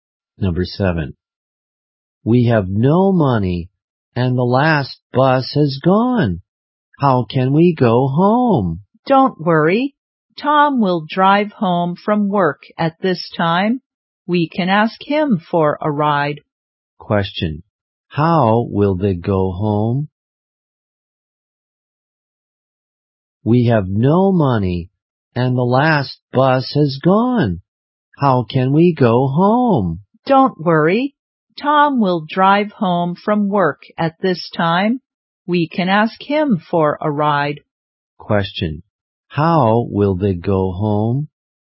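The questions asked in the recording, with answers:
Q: Question. How will they go home?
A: By Tom's car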